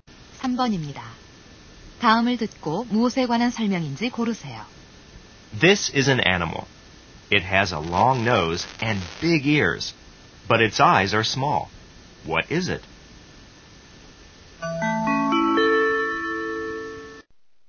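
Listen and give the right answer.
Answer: 코끼리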